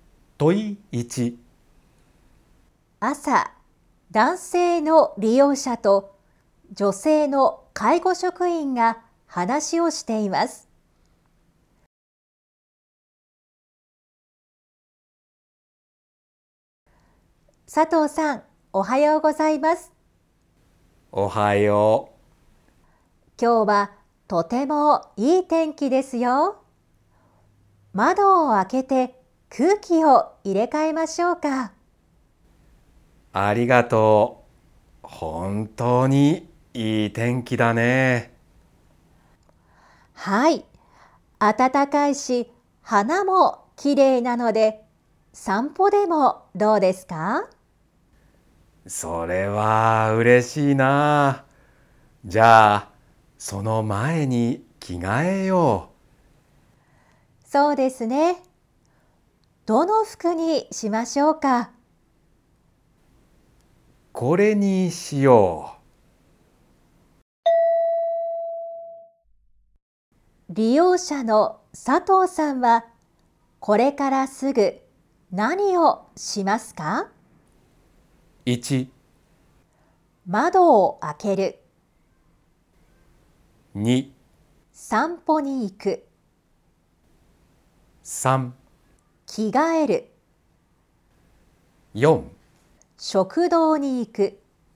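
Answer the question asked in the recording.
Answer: 3: 着替える。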